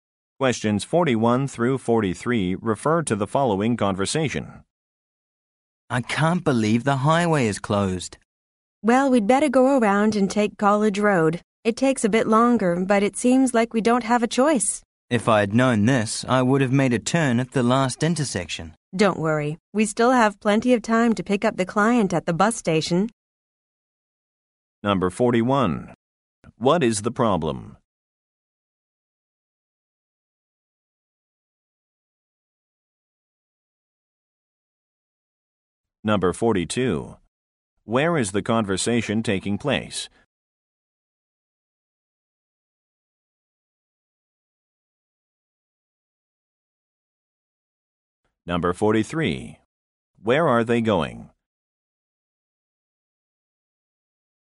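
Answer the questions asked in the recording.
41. The highway is closed.
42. In a car
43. To the bus station to pick up a client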